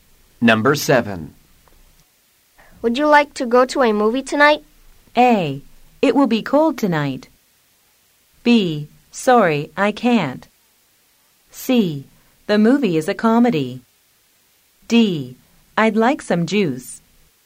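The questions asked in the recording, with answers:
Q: Would you like to go to a movie tonight?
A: B: Sorry, I can't.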